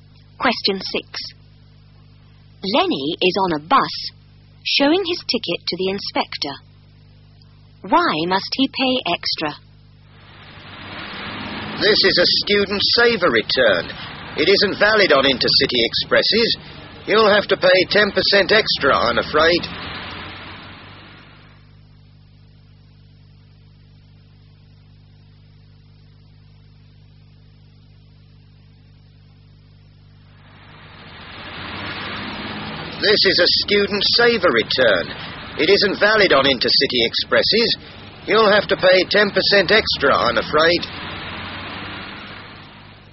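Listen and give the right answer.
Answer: His student saver return isn't valid on intercity expresses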